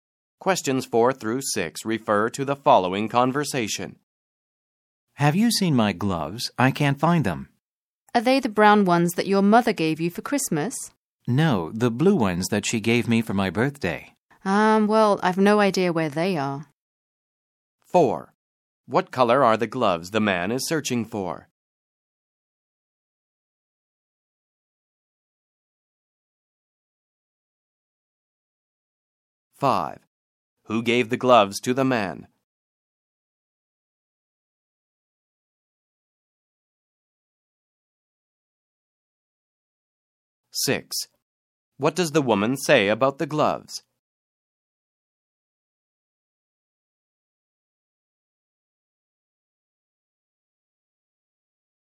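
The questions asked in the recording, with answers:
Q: What color are the gloves the man is searching for?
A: Blue

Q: Who gave the gloves to the man?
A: His mother

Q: What does the woman say about the gloves?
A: She has no idea where they are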